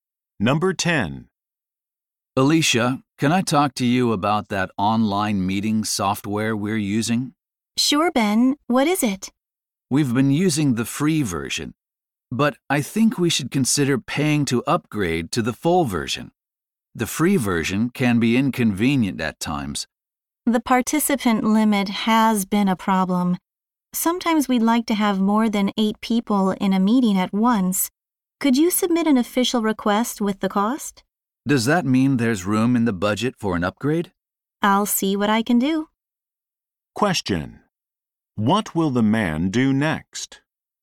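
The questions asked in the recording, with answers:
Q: Question: What will the man do next?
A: Submit an official request with the cost of upgrading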